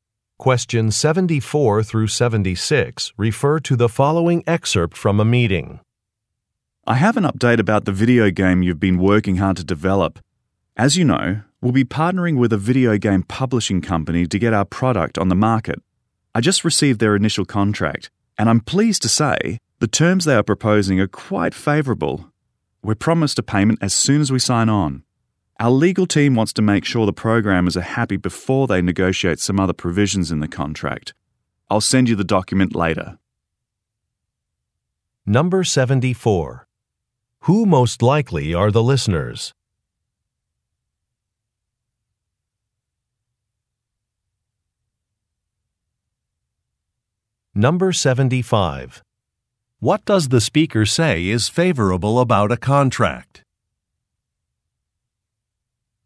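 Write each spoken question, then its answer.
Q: Who most likely are the listeners?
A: Video game programmers

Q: What does the speaker say is favorable about a contract?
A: They'll get a payment as soon as they sign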